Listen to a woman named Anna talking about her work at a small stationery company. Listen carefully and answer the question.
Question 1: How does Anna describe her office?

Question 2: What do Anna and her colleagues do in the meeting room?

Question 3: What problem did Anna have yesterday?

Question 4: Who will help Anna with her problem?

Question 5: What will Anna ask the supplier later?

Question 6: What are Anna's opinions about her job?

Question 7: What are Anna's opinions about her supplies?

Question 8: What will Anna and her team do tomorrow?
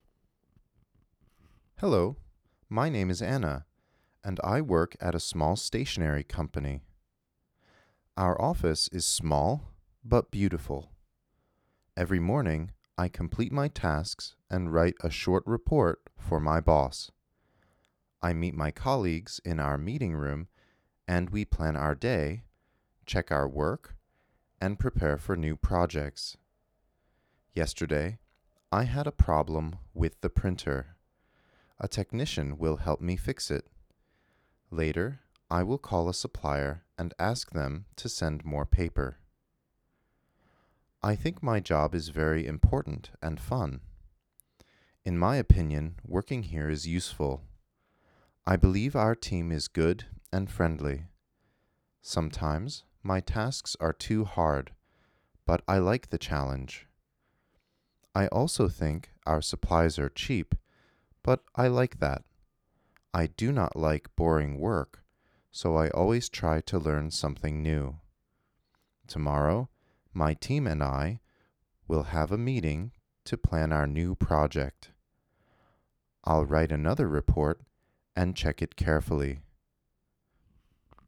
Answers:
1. Small but beautiful
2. They plan their day, check their work, and prepare for new projects.
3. Anna had a problem with the printer.
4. A technician will help her fix it.
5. She will ask a supplier to send more paper.
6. She thinks her job is important, fun, and useful,
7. She believes the supplies are cheap. She likes that.
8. They will have a meeting to plan their new project.

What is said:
Hello! My name is Anna, and I work at a small stationery company. Our office is small but beautiful. Every morning, I complete my tasks and write a short report for my boss. I meet my colleagues in our meeting room and we plan our day, check our work, and prepare for new projects.
Yesterday, I had a problem with the printer. A technician will help me fix it. Later, I will call a supplier and ask them to send more paper.
I think my job is very important and fun. In my opinion, working here is useful. I believe our team is good and friendly. Sometimes, my tasks are too hard, but I like the challenge.
I also think our supplies are cheap, but I like that. I do not like boring work, so I always try to learn something new.
Tomorrow, my team and I will have a meeting to plan our new project. I will write another report and check it carefully.